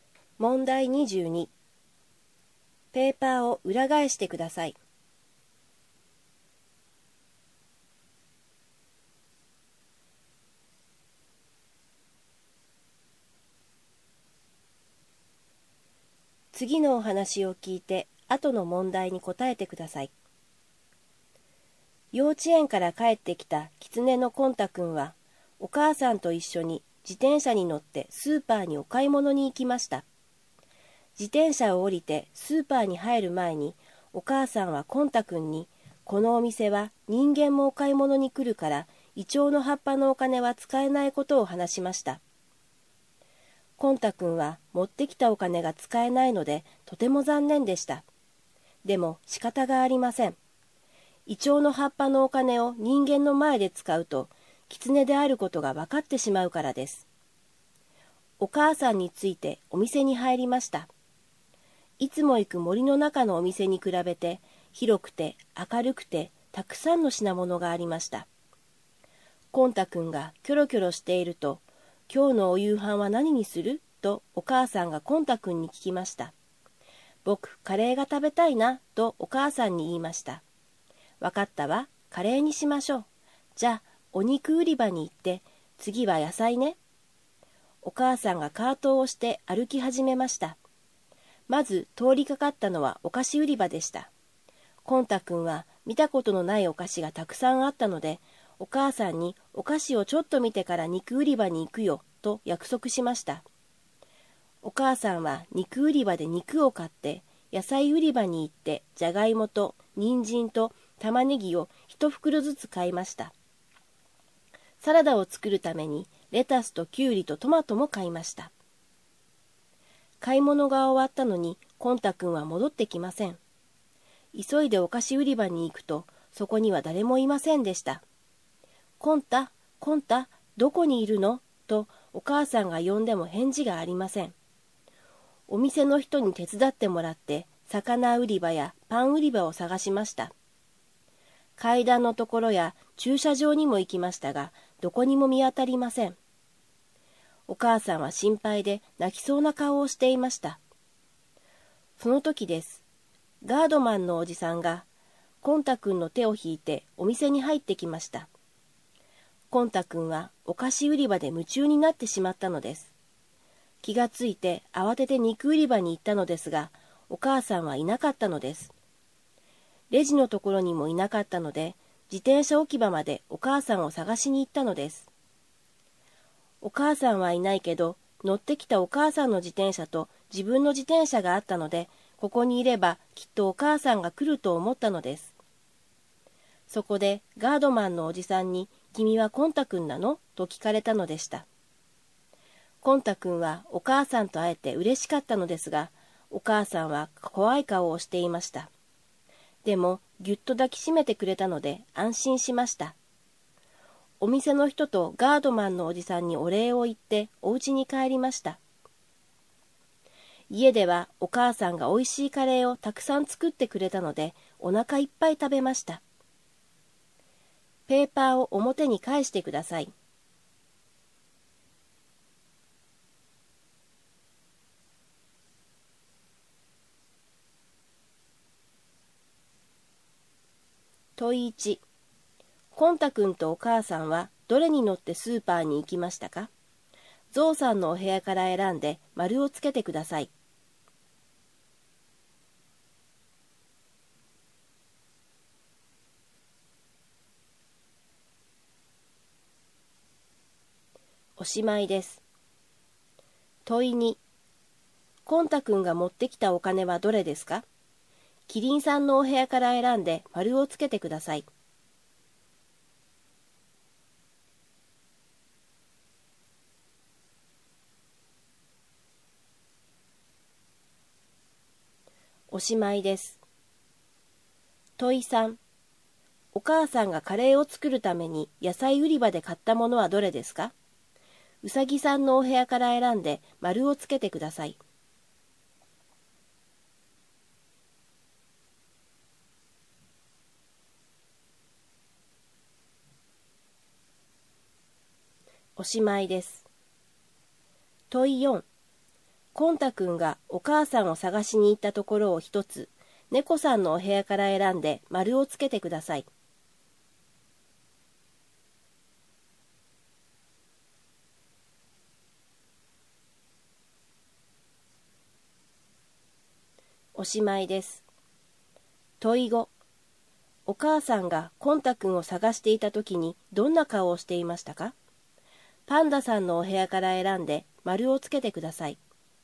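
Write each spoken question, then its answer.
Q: コンタ君とお母さんはどれに乗ってスーパーに行きましたか?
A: 自転車

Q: コンタ君が持ってきたお金はどれですか?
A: イチョウの葉っぱのお金

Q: お母さんがカレーを作るために野菜売り場で買ったものはどれですか?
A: じゃがいも、人参、玉ねぎ

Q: お母さんがコンタ君を探していたときにどんな顔をしていましたか?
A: 心配で泣きそうな顔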